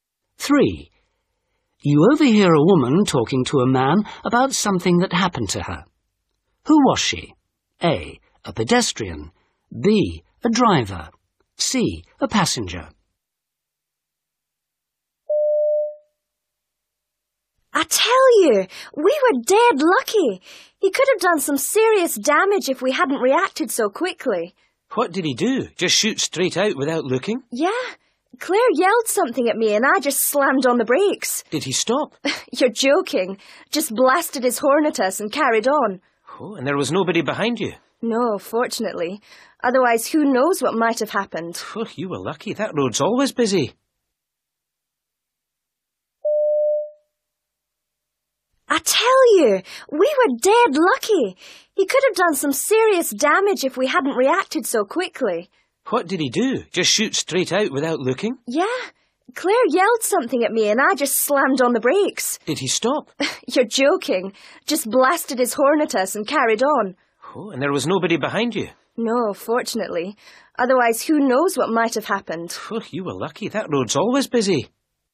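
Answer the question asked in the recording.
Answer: B: A driver.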